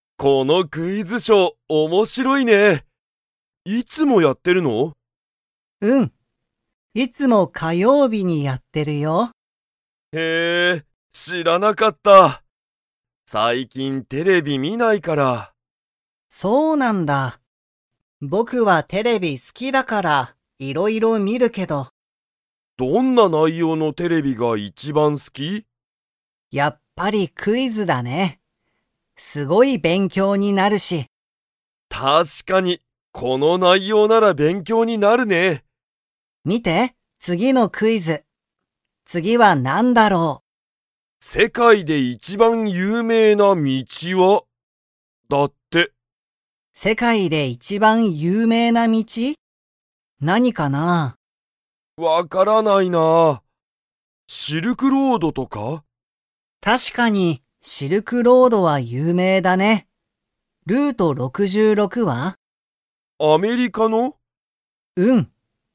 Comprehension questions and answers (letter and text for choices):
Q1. ユタカは、そのクイズショーを知(し)ってましたか?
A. はい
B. いいえ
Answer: B. いいえ

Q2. ハルは、クイズは____と思(おも)う。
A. 道(みち)が有名(ゆうめい)だ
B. テレビが好(す)きだ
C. いろいろ観(み)る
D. すごい勉強(べんきょう)になる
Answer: D. すごい勉強(べんきょう)になる

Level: Level 2